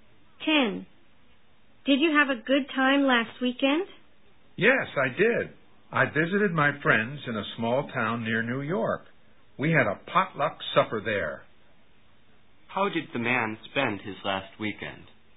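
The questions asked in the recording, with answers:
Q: How did the man spend his last weekend?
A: Visiting friends in a small town near New York, having a potluck supper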